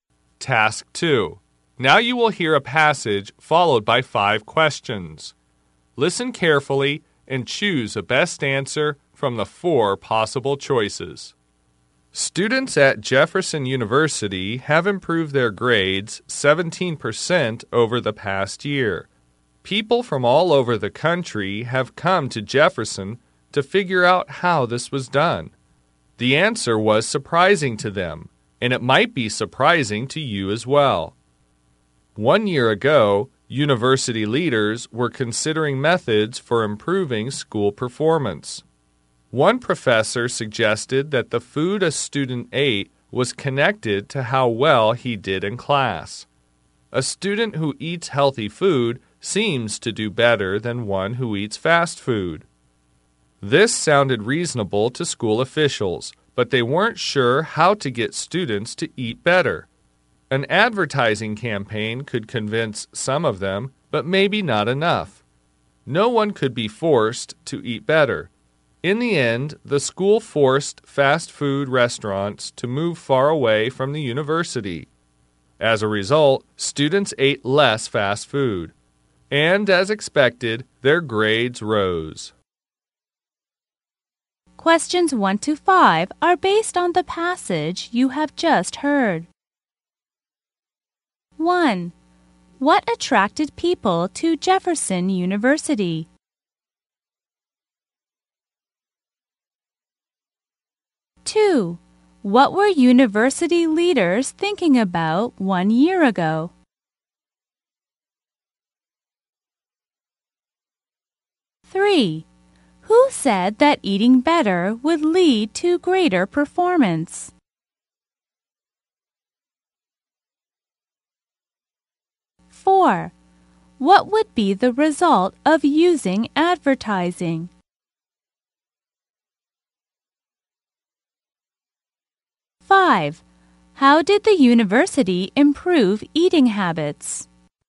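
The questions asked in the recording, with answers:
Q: What attracted people to Jefferson University?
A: Its students' 17% improvement in grades.

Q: What were university leaders thinking about 1 year ago?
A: Methods for improving school performance.

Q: Who said that eating better would lead to greater performance?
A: A professor.

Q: What would be the result of using advertising?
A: It could convince some students, but maybe not enough.

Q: How did the university improve eating habits?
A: It forced fast food restaurants to move far away.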